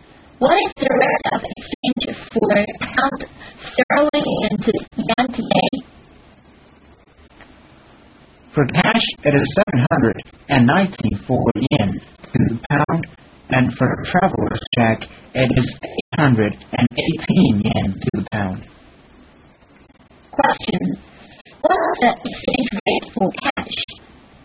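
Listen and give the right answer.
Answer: 719 yen to the pound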